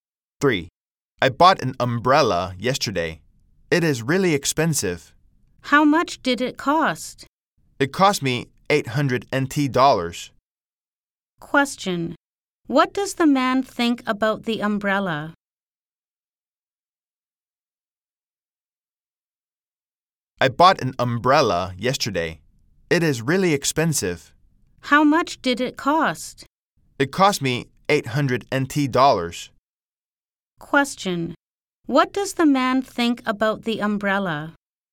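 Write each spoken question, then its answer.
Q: Question. What does the man think about the umbrella?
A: It is really expensive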